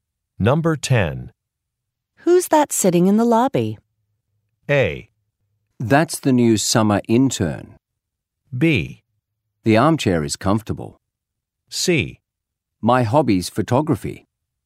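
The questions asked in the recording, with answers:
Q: Who's that sitting in the lobby?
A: A: That's the new summer intern.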